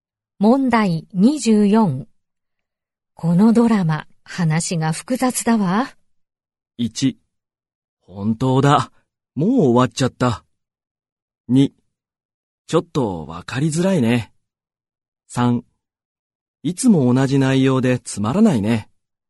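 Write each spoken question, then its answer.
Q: このドラマ、話が複雑だわ。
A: 2: ちょっとわかりづらいね。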